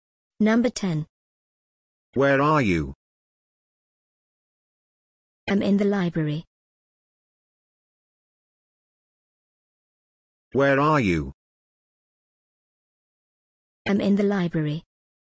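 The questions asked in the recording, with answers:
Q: Where are you?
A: In the library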